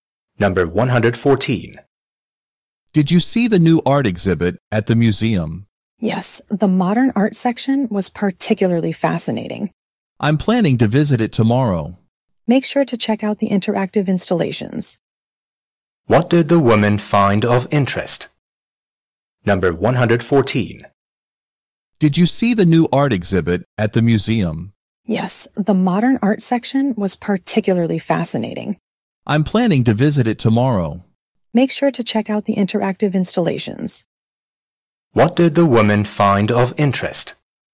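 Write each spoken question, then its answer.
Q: What did the woman find of interest?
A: The modern art section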